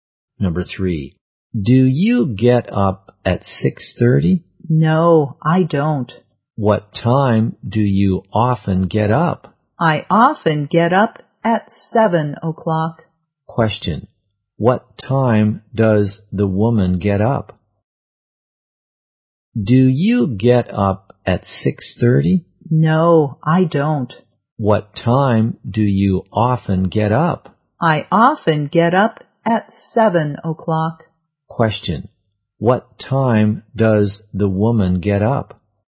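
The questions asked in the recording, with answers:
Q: Question, what time does the woman get up?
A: At 7 o'clock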